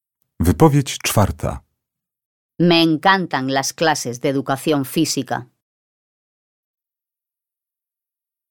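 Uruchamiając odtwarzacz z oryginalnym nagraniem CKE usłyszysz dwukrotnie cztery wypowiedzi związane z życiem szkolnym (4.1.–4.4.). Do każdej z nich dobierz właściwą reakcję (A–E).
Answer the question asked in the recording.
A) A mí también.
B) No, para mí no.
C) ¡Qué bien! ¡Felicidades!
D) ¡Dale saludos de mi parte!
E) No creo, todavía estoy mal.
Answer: A) A mí también.

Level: egzamin ósmoklasisty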